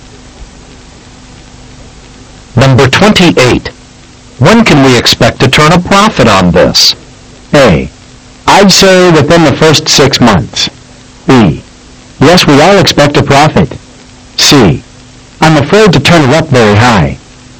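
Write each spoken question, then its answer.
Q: When can we expect to turn a profit on this?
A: A: I'd say within the first 6 months.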